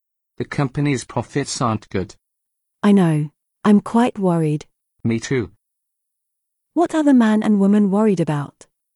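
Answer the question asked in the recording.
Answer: The company's profits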